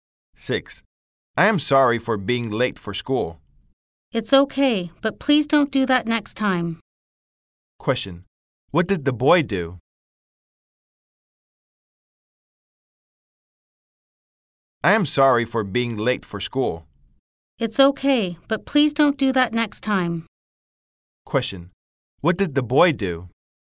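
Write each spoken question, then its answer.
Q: What did the boy do?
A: He was late for school.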